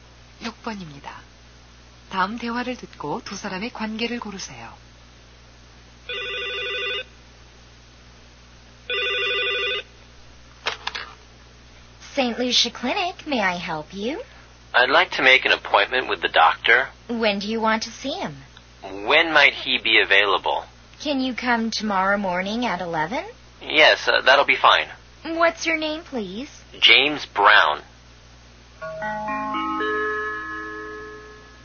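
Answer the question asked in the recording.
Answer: 병원 접수원과 환자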